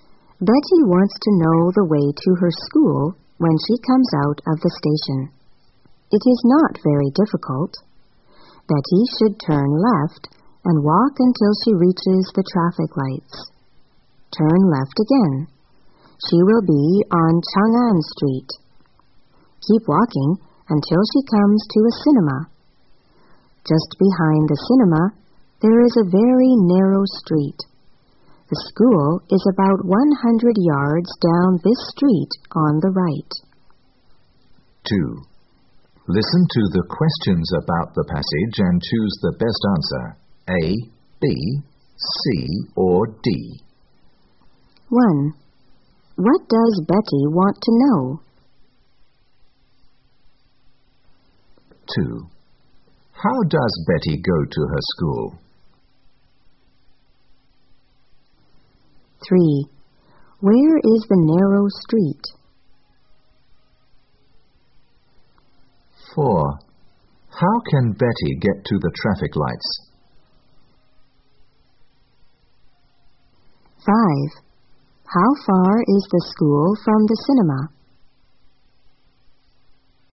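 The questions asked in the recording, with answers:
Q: What does Betty want to know?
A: The way to her school

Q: How does Betty go to her school?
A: On foot (she walks)

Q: Where is the narrow street?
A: Just behind the cinema

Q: How can Betty get to the traffic lights?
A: Turn left out of the station and walk

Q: How far is the school from the cinema?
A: About 100 yards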